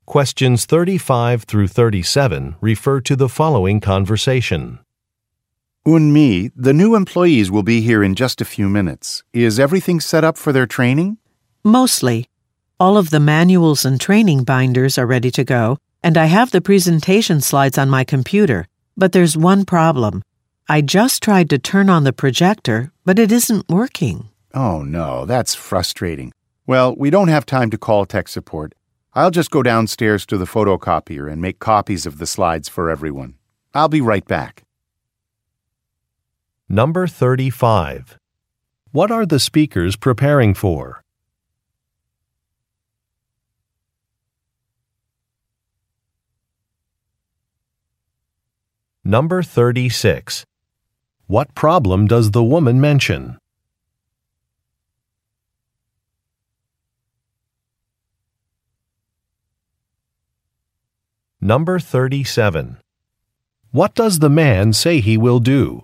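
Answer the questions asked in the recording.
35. A training session for new employees
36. The projector isn't working
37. Make copies of the slides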